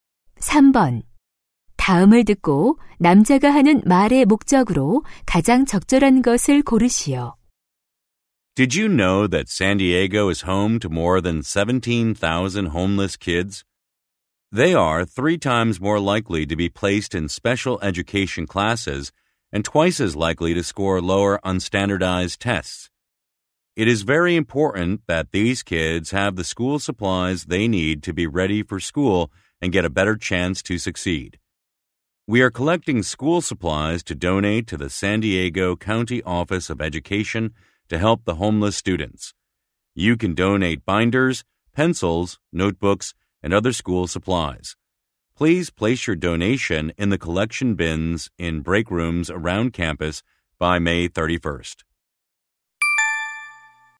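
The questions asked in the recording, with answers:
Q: 다음을 듣고 남자가 하는 말의 목적으로 가장 적절한 것을 고르시오.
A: 노숙 학생들을 위한 학용품 기부를 요청하려고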